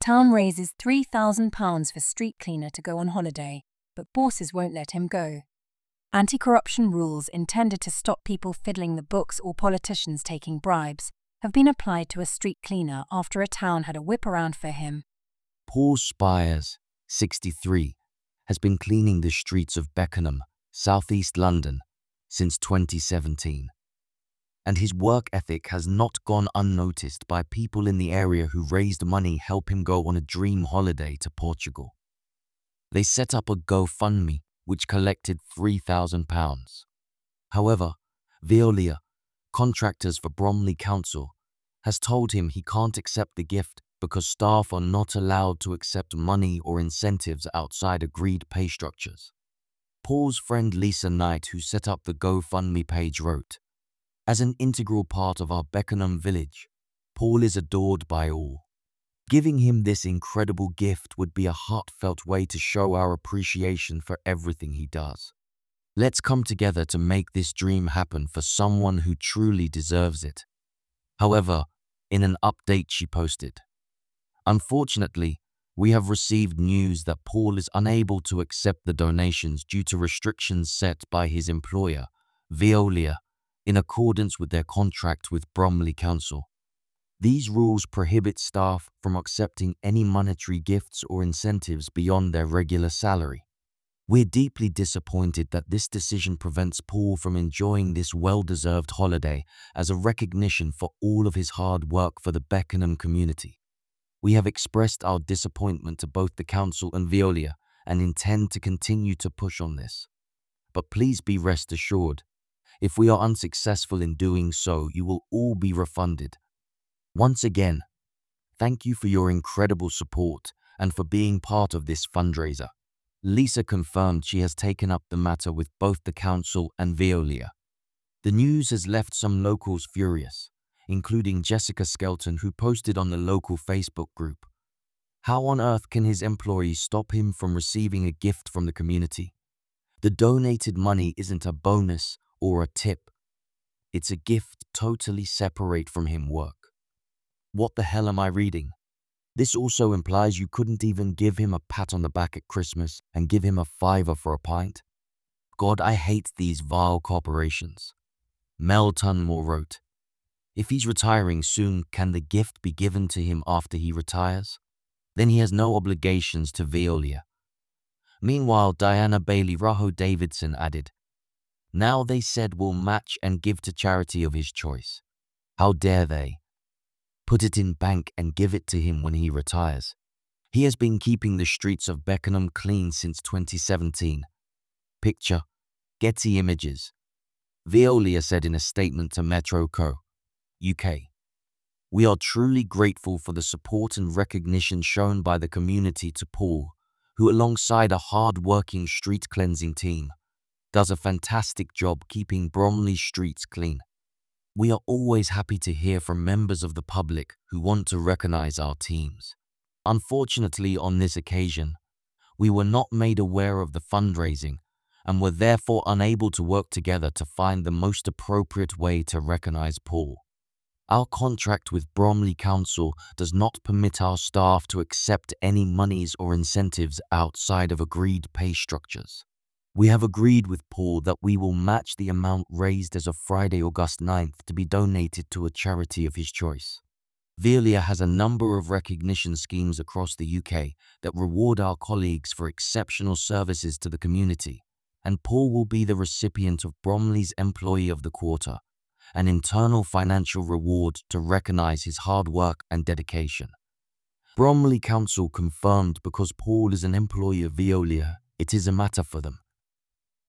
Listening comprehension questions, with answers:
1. Why did the town raise £3,000 for Paul Spiers?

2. What reason did Veolia give for not allowing Paul to accept the gift?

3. How did Lisa Knight describe Paul's role in the Beckenham community?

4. What actions has Lisa taken after learning that Paul cannot accept the donations?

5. How have some locals reacted to the news about Paul being unable to accept the gift?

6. What alternative proposal did Diana Bailey-Raho Davidson suggest regarding the donated money?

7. What will Veolia do with the amount raised for Paul?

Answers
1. The town raised £3,000 for Paul Spiers to go on a dream holiday to Portugal.
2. Veolia stated that staff are not allowed to accept money or incentives outside agreed pay structures.
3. Lisa Knight described Paul as an integral part of the Beckenham village who is adored by all.
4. Lisa has taken up the matter with both the council and Veolia after learning that Paul cannot accept the donations.
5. Some locals have expressed anger and frustration over Veolia's decision to prevent Paul from accepting the gift.
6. Diana Bailey-Raho Davidson suggested that the gift could be given to Paul after he retires so there are no obligations to Veolia.
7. Veolia will match the amount raised and donate it to a charity of Paul's choice, while also recognizing him as Bromley's Employee of the Quarter for his hard work and dedication.

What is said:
Town raises £3,000 for street cleaner to go on holiday but bosses won't let him go
Anti-corruption rules intended to stop people fiddling the books or politicians taking bribes have been applied to a street cleaner after a town had a whip around for him.
Paul Spiers, 63, has been cleaning the streets of Beckenham, south east London, since 2017. And his work ethic has not gone unnoticed by people in the area who raised money help him go on a dream holiday to Portugal. They set up a GoFundMe which collected £3,000.
However, Veolia, contractors for Bromley Council, has told him he can't accept the gift because staff are not allowed to accept money or incentives outside agreed pay structures.
Paul's friend Lisa Knight who set up the GoFundMe page wrote: 'As an integral part of our Beckenham village, Paul is adored by all.
'Giving him this incredible gift would be a heartfelt way to show our appreciation for everything he does.
Let's come together to make this dream happen for someone who truly deserves it.'
However, in an update she posted: 'Unfortunately, we have received news that Paul is unable to accept the donations due to restrictions set by his employer, Veolia, in accordance with their contract with Bromley Council.
'These rules prohibit staff from accepting any monetary gifts or incentives beyond their regular salary.
'We're deeply disappointed that this decision prevents Paul from enjoying this well-deserved holiday as a recognition for all of his hard work for the Beckenham community.
'We have expressed our disappointment to both the council and Veolia and intend to continue to push on this, but please be rest assured, if we are unsuccessful in doing so you will all be refunded.
'Once again, thank you for your incredible support and for being part of this fundraiser.'
Lisa confirmed she has taken up the matter with both the council and Veolia.
The news has left some locals furious, including Jessica Skelton who posted on the local Facebook group: 'How on earth can his employee stop him from receiving a gift from the community? The donated money isn't a "bonus" or a "tip" it's a gift totally separate from him work. What the hell am I reading?
'This also implies you couldn't even give him a pat on the back at Christmas and give him a fiver for a pint? 'God I hate these vile corporations.'
Mel Tunmore wrote: 'If he's retiring soon can the gift be given to him after he retires? Then he has no obligations to Veolia.'
Meanwhile Diana Bailey-Raho Davidson added: 'Now they said will match and give to charity of his choice ... how dare they ... put it in bank and give it to him when he retires.'
He has been keeping the streets of Beckenham clean since 2017.
Veolia said in a statement to Metro.co.uk: 'We are truly grateful for the support and recognition shown by the community to Paul, who alongside a hardworking street cleansing team, does a fantastic job keeping Bromley's streets clean.
'We are always happy to hear from members of the public who want to recognise our teams.
'Unfortunately on this occasion, we were not made aware of the fundraising and were therefore unable to work together to find the most appropriate way to recognise Paul.
'Our contract with Bromley Council does not permit our staff to accept any monies or incentives outside of agreed pay structures.
'We have agreed with Paul that we will match the amount raised as of Friday 9th August to be donated to a charity of his choice.
'Veolia has a number of recognition schemes across the UK that reward our colleagues for exceptional services to the community and Paul will be the recipient of Bromley's Employee of the Quarter – an internal financial reward to recognise his hard work and dedication.'
Bromley Council confirmed because Paul is an employee of Veolia it is a matter for them.
source: Metro